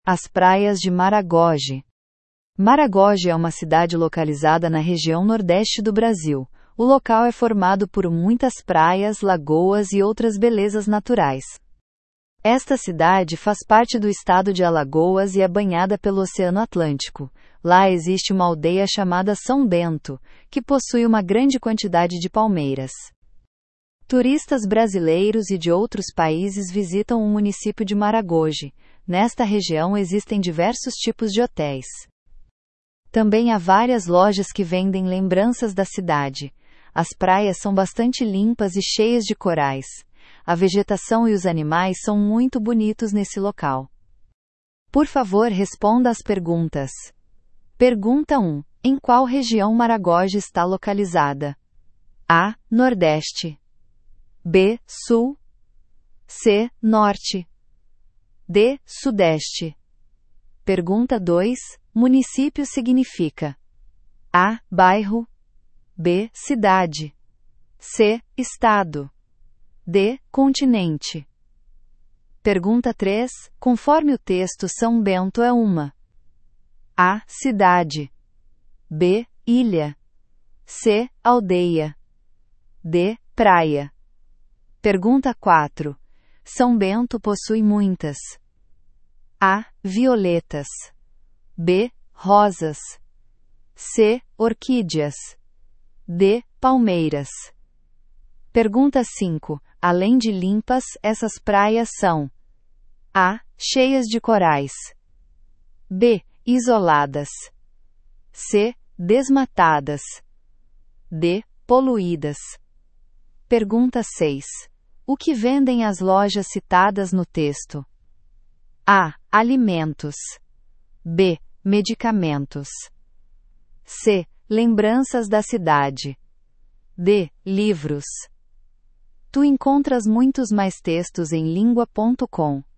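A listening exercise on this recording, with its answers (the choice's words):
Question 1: Em qual região Maragogi está localizada?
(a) Nordeste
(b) Sul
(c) Norte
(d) Sudeste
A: Nordeste

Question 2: Município significa:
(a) Bairro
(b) Cidade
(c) Estado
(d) Continente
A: Cidade

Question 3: Conforme o texto, "São Bento" é uma:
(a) Cidade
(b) Ilha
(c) Aldeia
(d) Praia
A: Aldeia

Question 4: São Bento possui muitas:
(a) Violetas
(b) Rosas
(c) Orquídeas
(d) Palmeiras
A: Palmeiras

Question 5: Além de limpas, essas praias são:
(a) Cheias de corais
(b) Isoladas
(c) Desmatadas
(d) Poluídas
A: Cheias de corais

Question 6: O que vendem as lojas citadas no texto?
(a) Alimentos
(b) Medicamentos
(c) Lembranças da cidade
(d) Livros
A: Lembranças da cidade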